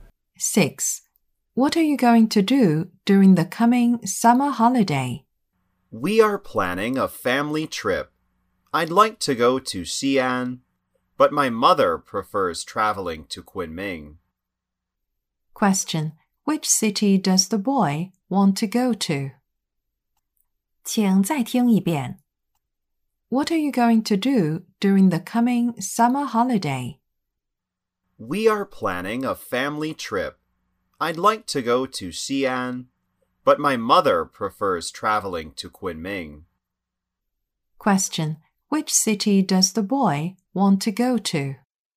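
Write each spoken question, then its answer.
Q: Which city does the boy want to go to?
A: Xi'an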